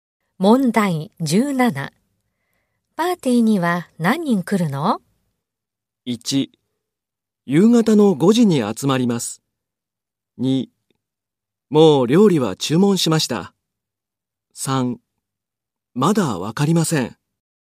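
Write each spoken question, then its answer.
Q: パーティーには何人来るの?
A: 3: まだわかりません。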